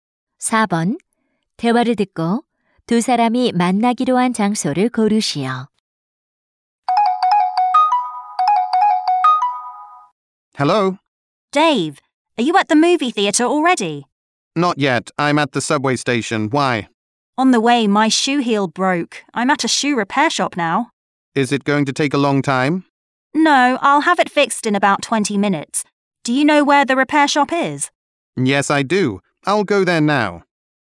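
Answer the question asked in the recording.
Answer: 구두 수선점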